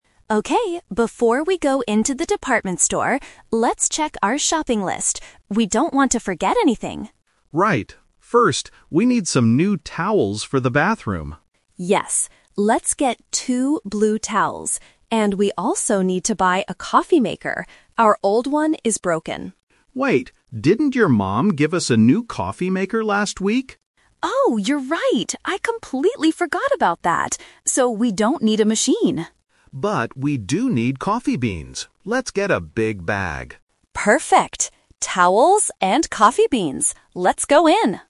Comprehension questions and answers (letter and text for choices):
Listen to the conversation and choose the correct answer (A, B, or C) for each question.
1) What are the speakers doing right now?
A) They are paying for their shopping.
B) They are checking their shopping list.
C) They are drinking coffee in a café.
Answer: B) They are checking their shopping list.

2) Why do they decide NOT to buy a coffee maker?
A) Because it is too expensive.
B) Because the department store doesn't sell it.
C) Because they already got a new one last week.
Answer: C) Because they already got a new one last week.

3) What is on their final shopping list?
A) Towels and a coffee maker.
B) Towels and coffee beans.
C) Coffee beans and a bathroom mirror.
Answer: B) Towels and coffee beans.

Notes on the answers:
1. In the first line, the wife clearly says, "let's check our shopping list." They are outside the store preparing to go in. Why the trap is wrong: Option (A) is a trap because they haven't bought anything yet. Option (C) is a distractor using the word "coffee", but they are not in a café.
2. The husband reminds his wife, "didn't your mom give us a new coffee maker last week?" and she agrees. Why the trap is wrong: Options (A) and (B) are plausible reasons in a shopping context, but the speakers never mention the price or the store running out of coffee makers.
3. This is "The Twist". They wanted a coffee maker, changed their minds, and at the end, the wife confirms the final list: "Towels and coffee beans." Why the trap is wrong: Option (A) is the trap. The coffee maker was mentioned and originally on the list, but they rejected it. Option (C) is plausible for a bathroom but a mirror was never mentioned.

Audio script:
Wife: Okay, before we go into the department store, let's check our shopping list. We don't want to forget anything.
Husband: Right. First, we need some new towels for the bathroom.
Wife: Yes, let's get two blue towels. And we also need to buy a coffee maker. Our old one is broken.
Husband: Wait, didn't your mom give us a new coffee maker last week?
Wife: Oh, you're right! I completely forgot about that. So we don't need a machine.
Husband: But we do need coffee beans. Let's get a big bag.